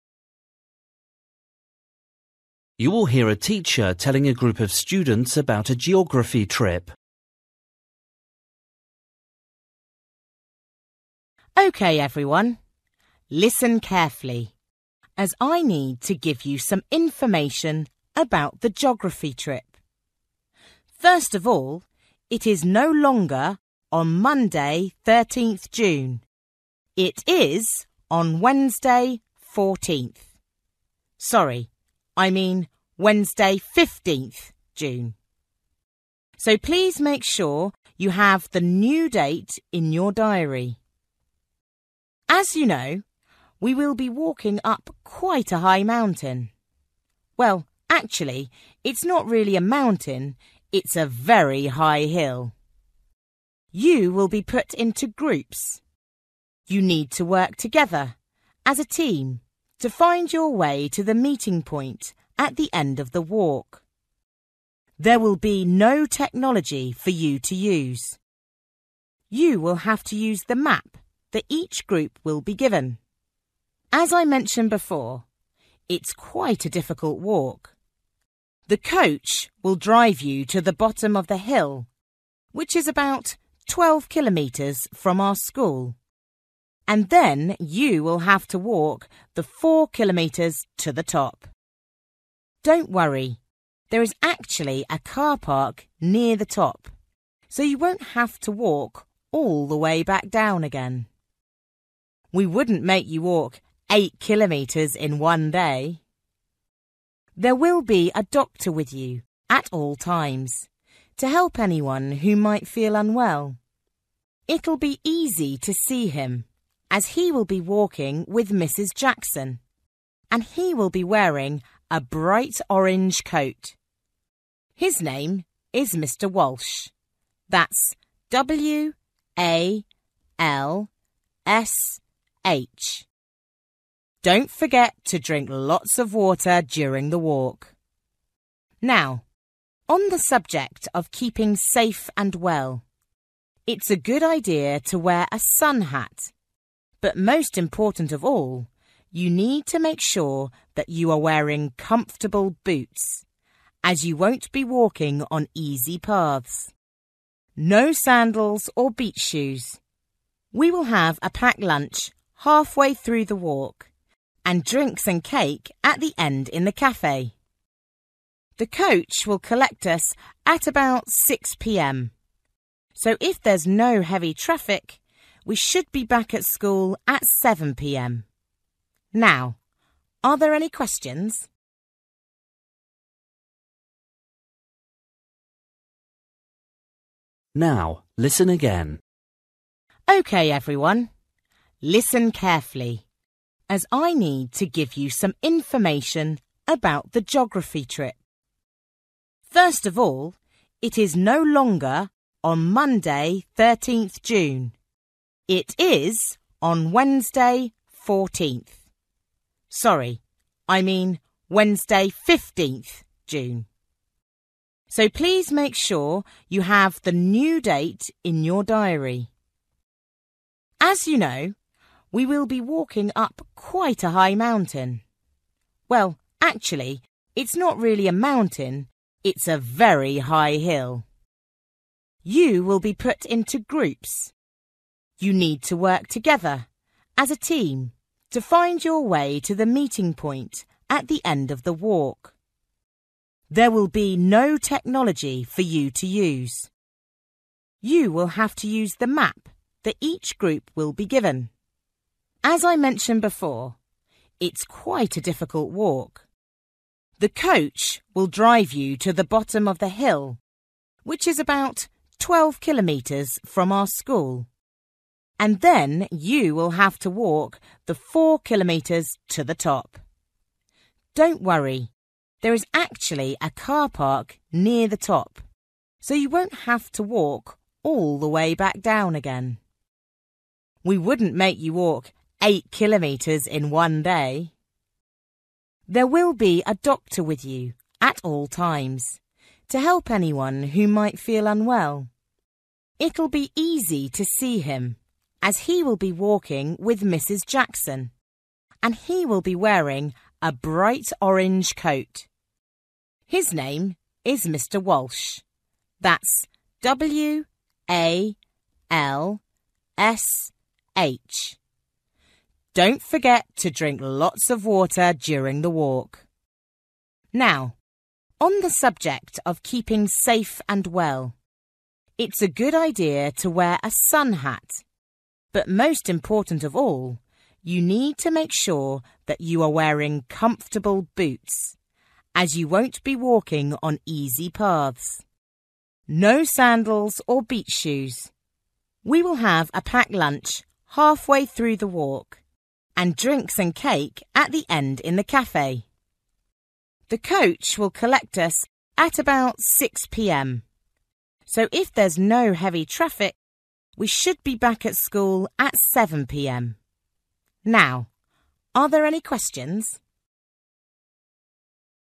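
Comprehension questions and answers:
For each question, write the correct answer in the gap. Write one or two words or a number or a date or a time. You will hear a teacher telling a group of students about a geography trip.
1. Date of Geography trip: Wednesday (1)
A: 15th June

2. Each group will be given: a (2)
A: map

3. Length of walk: (3)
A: 4 kilometres

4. Person responsible for health issues: (4) Mr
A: Walsh

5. Type of shoes to wear: (5)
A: comfortable boots

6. Coach arrives at school at: (6) p.m.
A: 7

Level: Luyện nghe trình độ B1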